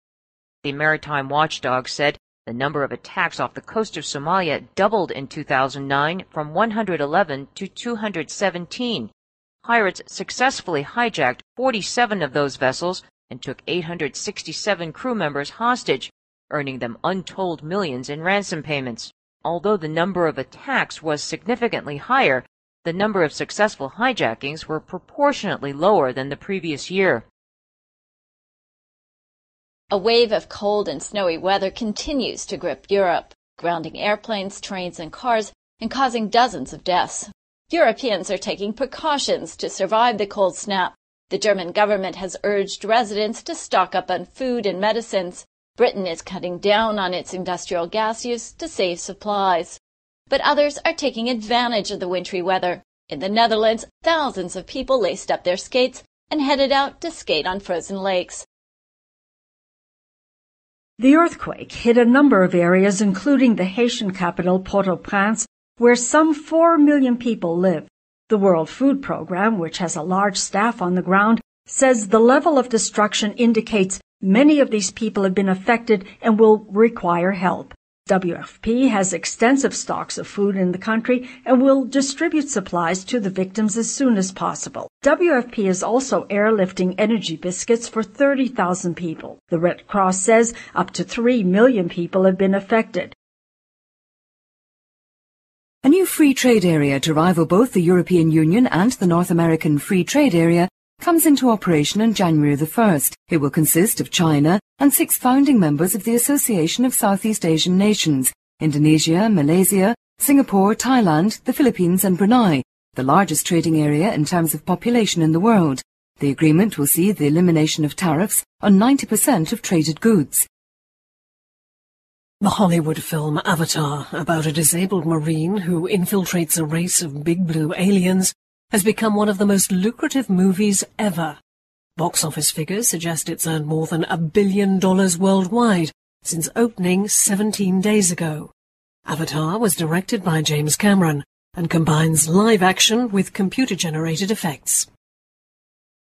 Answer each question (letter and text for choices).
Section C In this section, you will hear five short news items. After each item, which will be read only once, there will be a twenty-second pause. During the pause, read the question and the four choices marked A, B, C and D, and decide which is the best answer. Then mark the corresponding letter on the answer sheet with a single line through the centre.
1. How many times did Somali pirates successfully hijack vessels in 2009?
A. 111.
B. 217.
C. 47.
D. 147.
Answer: C. 47.

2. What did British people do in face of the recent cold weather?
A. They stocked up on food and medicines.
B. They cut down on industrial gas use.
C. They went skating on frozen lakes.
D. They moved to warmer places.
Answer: B. They cut down on industrial gas use.

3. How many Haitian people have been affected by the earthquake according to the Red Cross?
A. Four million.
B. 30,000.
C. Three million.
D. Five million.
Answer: C. Three million.

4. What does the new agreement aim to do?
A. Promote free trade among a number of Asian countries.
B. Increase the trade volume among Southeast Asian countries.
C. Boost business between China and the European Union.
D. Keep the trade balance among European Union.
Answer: A. Promote free trade among a number of Asian countries.

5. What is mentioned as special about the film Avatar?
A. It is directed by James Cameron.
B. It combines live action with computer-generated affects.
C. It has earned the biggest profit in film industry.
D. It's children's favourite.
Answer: B. It combines live action with computer-generated affects.

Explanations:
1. 录音的开始提到一个海事管理机构(a maritime watchdog)说2009年索马里海岸的袭击数量加倍了从111上升到217。海盗成功劫持了其中的47艘船只和船上867名人员做人质(Pirates successfully hijacked 47 of those vessels and took 867 crew members hostage...),由此可见答案是C。
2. 本题的新闻是寒冷的风雪天气继续肆虐欧洲,使飞机、火车和汽车搁浅,并导致十多人死亡。欧洲人正在采取预防措施来度过寒冷的天气。其中英国采取的措施是Britain is cutting down on its industrial gas use to save supplies(英国已经关闭工业用天然气,以节约供应。),故答案选B。
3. 本则新闻主要讲地震袭击了几个地区,包括海地首都太子港在内,共有大约400万人口居住在这里。其中最后一句提到"The Red Cross says up to three million people have been affected."(红十字会说多达三百万人受到影响),故答案选C。
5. 录音中提到好莱坞电影《阿凡达》成为最赚钱的电影之一(The Hollywood film Avatar...has become one of the most lucrative movies ever.),所以C项不正确。而且在最后提到"Avatar was directed by James Cameron and combines live action with computer-generated effects."(《阿凡达》是有James Cameron导演的,是将真人动作和电脑特效相结合的),由此可推断出《阿凡达》特殊之处在于真人动作和电脑特效相结合,故选B。

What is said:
[听力原文] A maritime watchdog said the number of attacks off the coast of Somalia doubled in 2009 from 111 to 217. Pirates successfully hijacked 47 of those vessels and took 867 crew members hostage, earning them untold millions in ransom payments. Although the number of attacks was significantly higher, the number of successful hijackings was proportionately lower than the previous year.
[听力原文] A wave of cold and snowy weather continues to grip Europe, grounding airplanes, trains and cars, and causing dozens of deaths. Europeans are taking precautions to survive the cold snap. The German government has urged residents to stock up on food and medicines. Britain is cutting down on its industrial gas use to save supplies. But others are taking advantage of the wintry weather. In the Netherlands, thousands of people laced up their skates and headed out to skate on frozen lakes.
3.
[听力原文] The earthquake hit a number of areas including the Haitian capital, Port-au-Prince, where some four million people live. The World Food Program, which has a large staff on the ground, says the level of destruction indicates many of these people have been affected and will require help. WFP has extensive stocks of food in the country and will distribute supplies to the victims as soon as possible. WFP is also airlifting energy biscuits for 30,000 people. The Red Cross says up to three million people have been affected.
A
[听力原文] A new free trade area to rival both the European Union and the North American Free Trade Area comes into operation on January 1st. It will consist of China and six founding members of the Association of Southeast Asian Nations—Indonesia, Malaysia, Singapore, Thailand, the Philippines and Brunei, the largest trading area in terms of population in the world. The agreement will see the elimination of tariffs on 90% of traded goods.